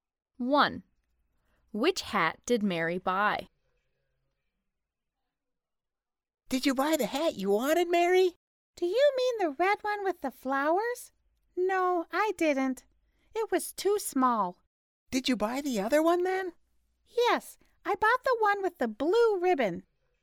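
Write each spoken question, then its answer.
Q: Which hat did Mary buy?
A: The one with the blue ribbon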